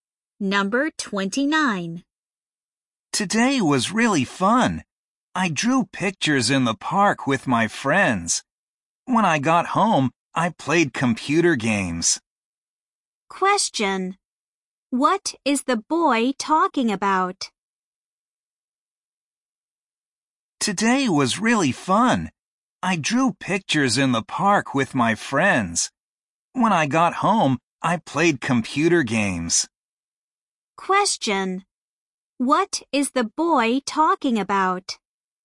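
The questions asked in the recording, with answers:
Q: What is the boy talking about?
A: His fun day (drawing pictures in the park and playing computer games)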